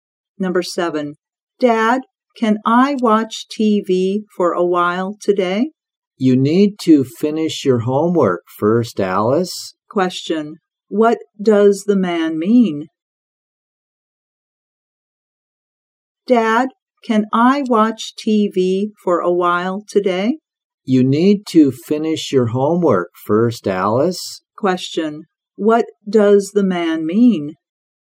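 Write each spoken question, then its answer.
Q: what does the man mean?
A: Alice has to finish her homework before she watches TV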